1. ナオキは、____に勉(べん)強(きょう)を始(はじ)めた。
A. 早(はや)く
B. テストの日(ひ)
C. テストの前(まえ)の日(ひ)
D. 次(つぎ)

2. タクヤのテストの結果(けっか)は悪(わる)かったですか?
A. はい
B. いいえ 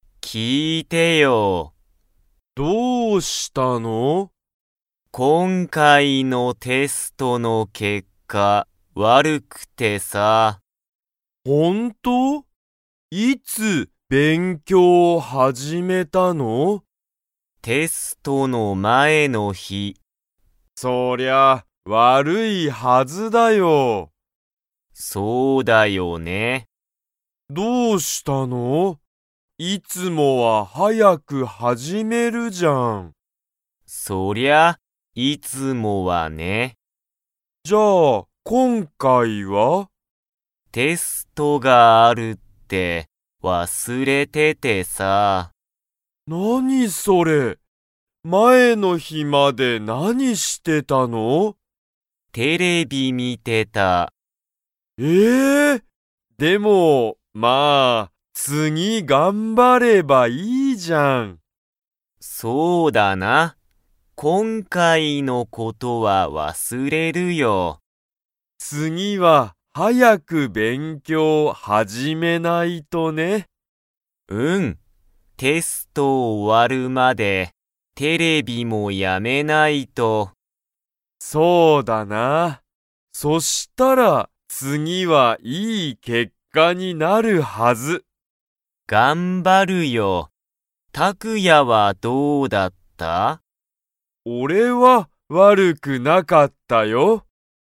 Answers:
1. C
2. B

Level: Level 2

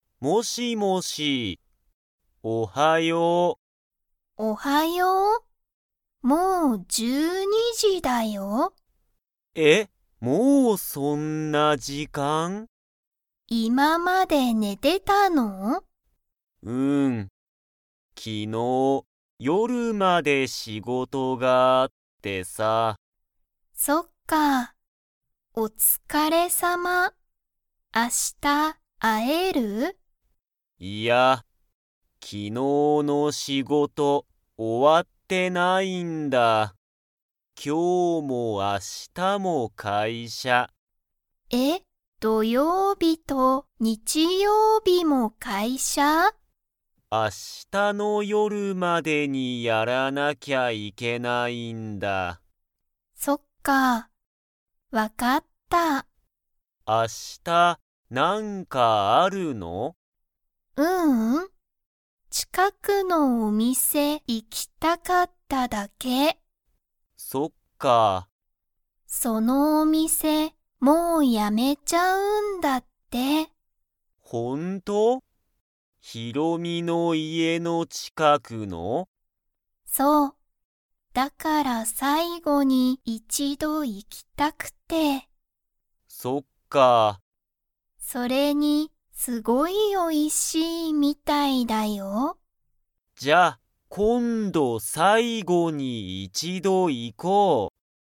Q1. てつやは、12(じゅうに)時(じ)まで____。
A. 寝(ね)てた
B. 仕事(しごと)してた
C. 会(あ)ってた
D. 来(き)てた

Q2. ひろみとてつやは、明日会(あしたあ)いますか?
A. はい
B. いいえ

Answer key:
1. A
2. B

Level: Level 2

